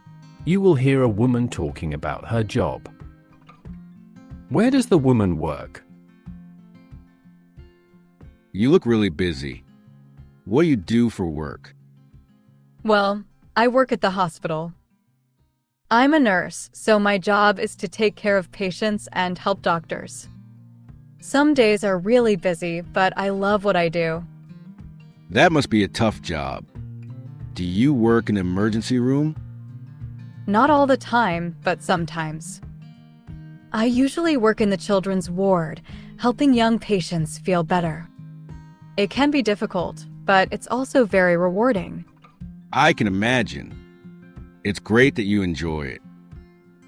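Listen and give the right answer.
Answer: at the hospital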